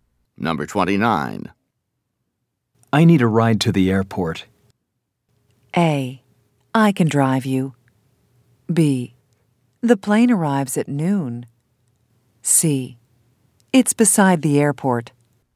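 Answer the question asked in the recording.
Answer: A: I can drive you.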